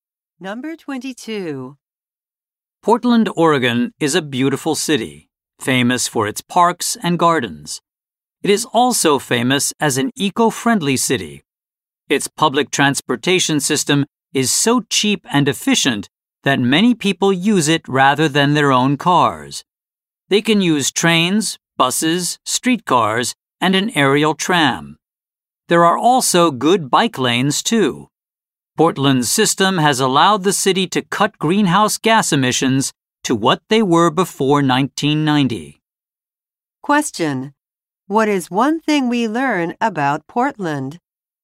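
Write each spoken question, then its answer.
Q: What is one thing we learn about Portland?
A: Its cheap, efficient public transportation has helped cut greenhouse gas emissions.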